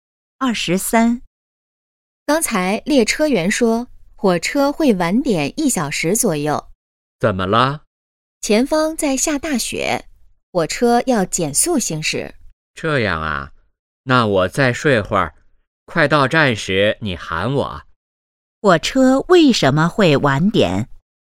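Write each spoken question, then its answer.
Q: 火车为什么会晚点?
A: 前方下大雪,要减速行驶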